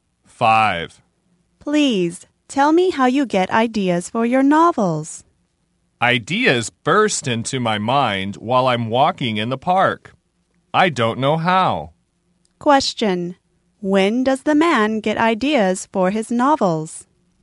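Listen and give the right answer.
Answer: While walking in the park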